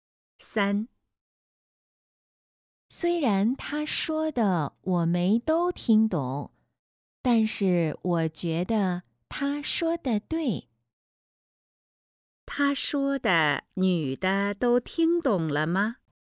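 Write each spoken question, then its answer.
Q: 他说的女的都听懂了吗?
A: 没都听懂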